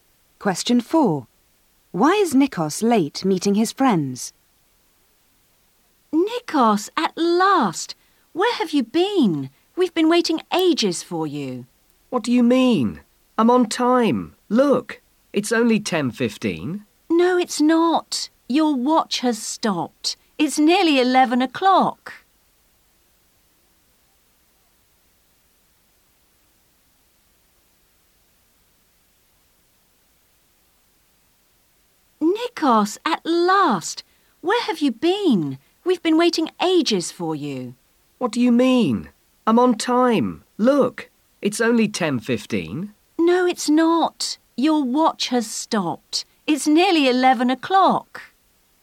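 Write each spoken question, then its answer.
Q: Why is Nikos late meeting his friends?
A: His watch has stopped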